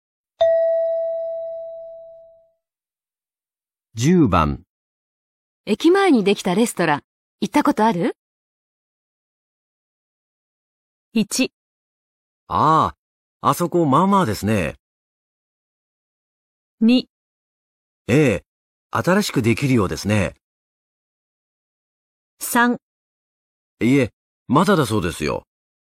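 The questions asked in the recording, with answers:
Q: 駅前にできたレストラン、行ったことある?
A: 1: ああ、あそこまあまあですね。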